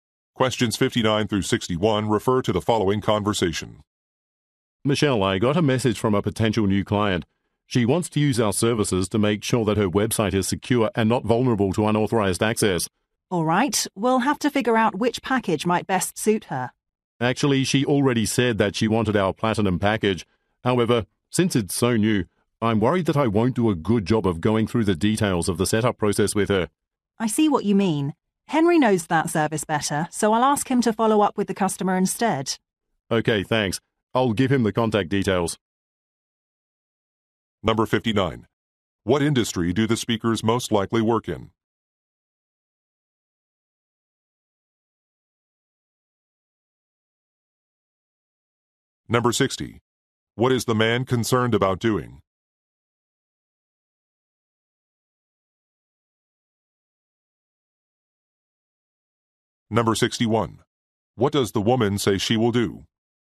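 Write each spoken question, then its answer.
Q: What industry do the speakers most likely work in?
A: Website security

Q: What is the man concerned about doing?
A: Explaining the setup process of the new Platinum package

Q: What does the woman say she will do?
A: Ask Henry to follow up with the customer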